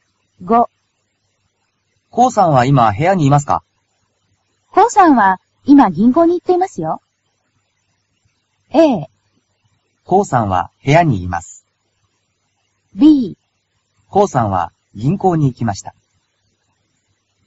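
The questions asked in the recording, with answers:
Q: コウさんは今部屋にいますか?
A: B: コウさんは銀行に行きました。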